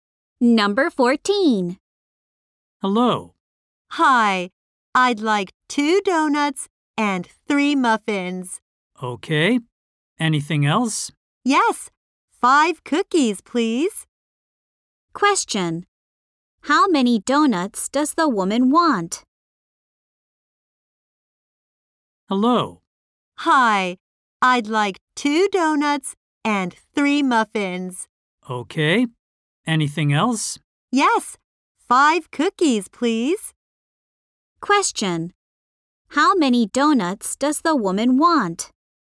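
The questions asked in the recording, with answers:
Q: How many donuts does the woman want?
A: Two.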